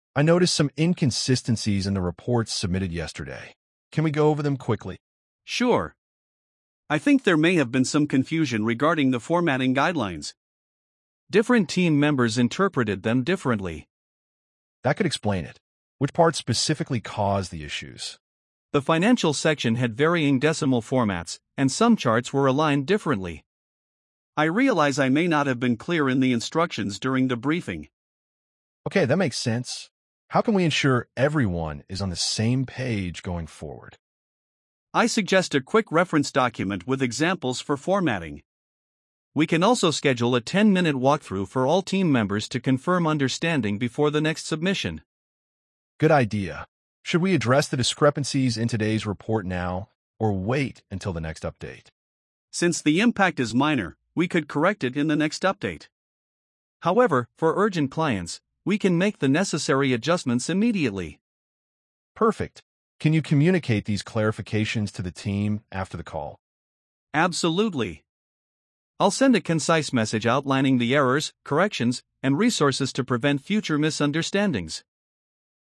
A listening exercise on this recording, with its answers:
Complete the phrases as you listen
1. I noticed some ______ in the reports submitted yesterday.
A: inconsistencies

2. Can we go ______ them quickly?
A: over

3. There may have been some confusion ______ the formatting guidelines.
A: regarding

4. Different team members ______ them differently.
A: interpreted

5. The financial section had ______ decimal formats.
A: varying

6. I realize I may not have been ______ in the instructions.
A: clear

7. I suggest a quick ______ document with examples.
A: reference

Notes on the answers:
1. "I noticed some inconsistencies in the reports submitted yesterday."
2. "Can we go over them quickly?"
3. "I think there may have been some confusion regarding..."
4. "Different team members interpreted them differently."
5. "The financial section had varying decimal formats."
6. "I realize I may not have been clear in the instructions."
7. "I suggest a quick reference document with examples."

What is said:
"I noticed some inconsistencies in the reports submitted yesterday. Can we go over them quickly?"
"Sure. I think there may have been some confusion regarding the formatting guidelines. Different team members interpreted them differently."
"That could explain it. Which parts specifically caused the issues?"
"The financial section had varying decimal formats, and some charts were aligned differently. I realize I may not have been clear in the instructions during the briefing."
"Okay, that makes sense. How can we ensure everyone is on the same page going forward?"
"I suggest a quick reference document with examples for formatting. We can also schedule a 10-minute walkthrough for all team members to confirm understanding before the next submission."
"Good idea. Should we address the discrepancies in today's report now or wait until the next update?"
"Since the impact is minor, we could correct it in the next update. However, for urgent clients, we can make the necessary adjustments immediately."
"Perfect. Can you communicate these clarifications to the team after the call?"
"Absolutely. I'll send a concise message outlining the errors, corrections, and resources to prevent future misunderstandings."